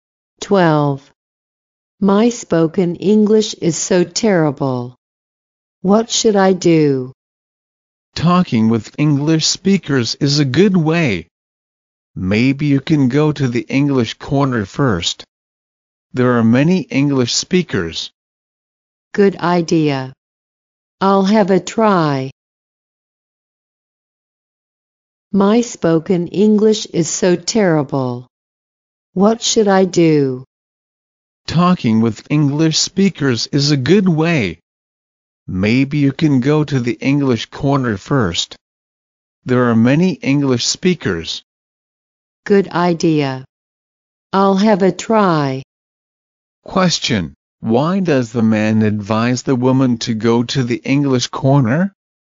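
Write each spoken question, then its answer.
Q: Question, why does the man advise the woman to go to the English corner?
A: Because there are many English speakers there.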